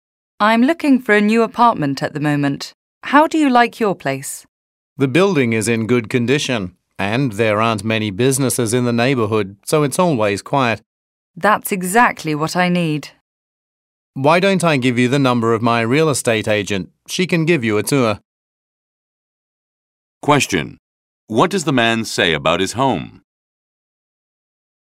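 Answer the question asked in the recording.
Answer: The building is in good condition and the neighborhood is always quiet.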